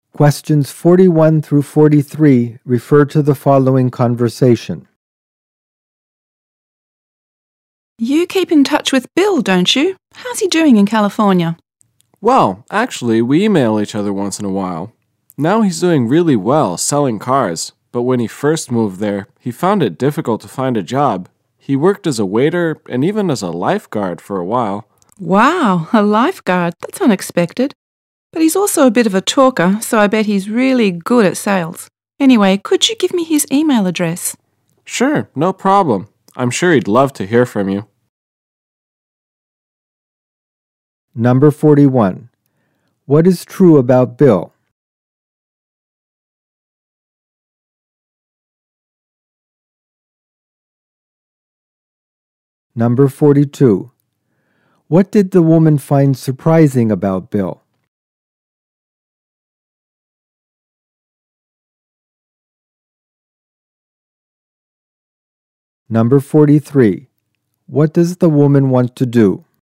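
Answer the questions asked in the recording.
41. He is doing well selling cars in California
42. He worked as a lifeguard
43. Get Bill's email address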